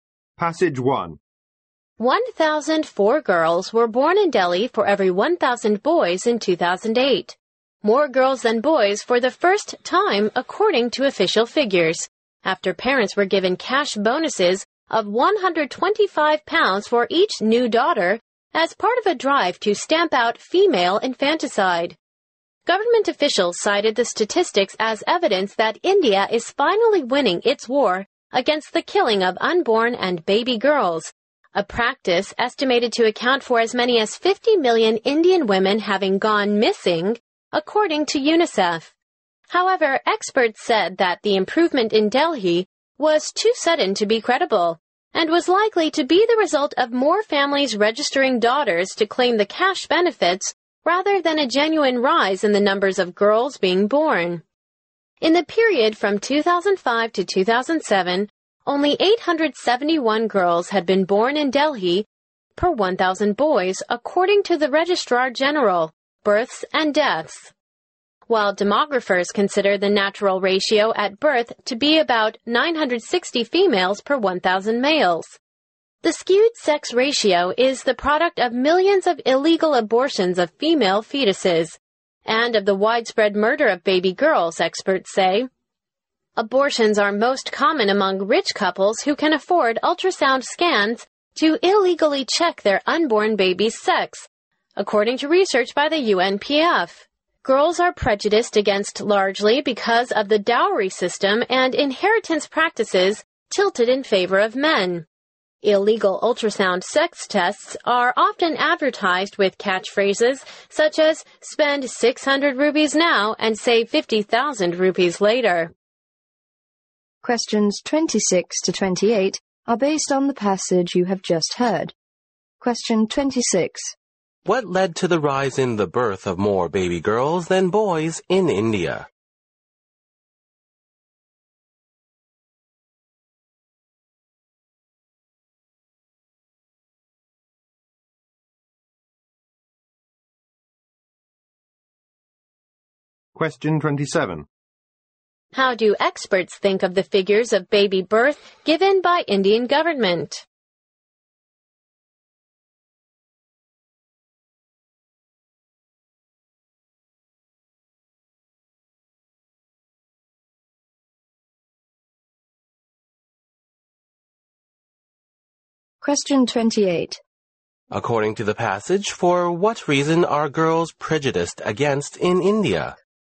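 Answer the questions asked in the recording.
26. Cash bonuses given to parents for each new daughter
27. Not credible; likely due to more registration to claim cash.
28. The dowry system and inheritance practices favoring men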